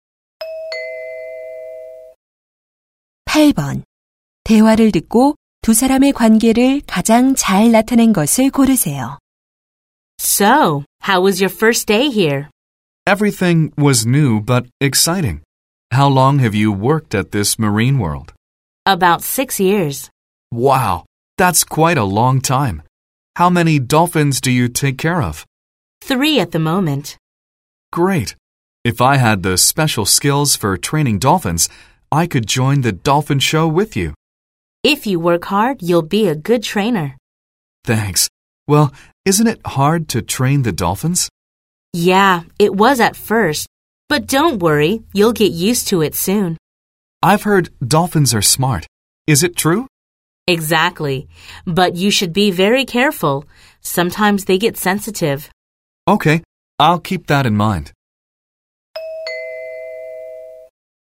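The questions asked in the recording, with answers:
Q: 대화를 듣고 두 사람의 관계를 가장 잘 나타낸 것을 고르세요.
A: 돌고래 조련사 선배와 신입 직원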